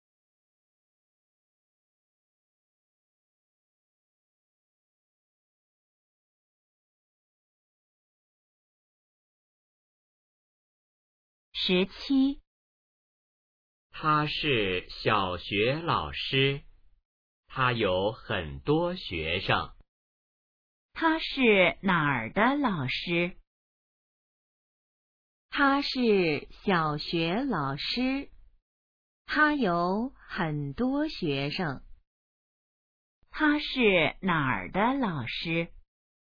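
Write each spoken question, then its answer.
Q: 他是哪儿的老师?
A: 小学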